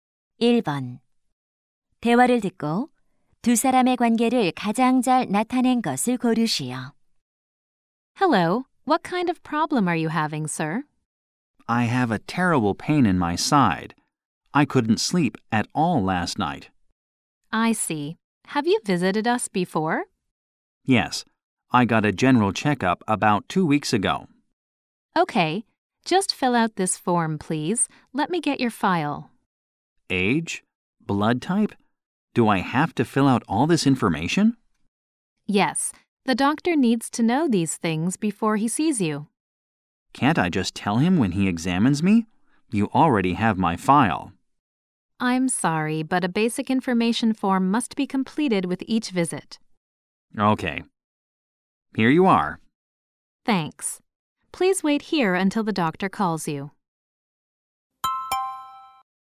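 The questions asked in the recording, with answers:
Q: 대화를 듣고 두 사람의 관계를 가장 잘 나타낸 것을 고르시오.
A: 병원 접수원 - 환자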